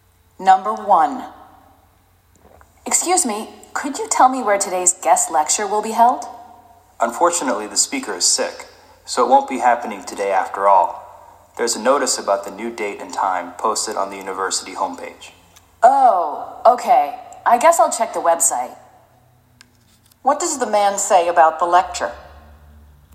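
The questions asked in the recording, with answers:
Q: What does the man say about the lecture?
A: It won't happen today because the speaker is sick; the new date is on the university homepage.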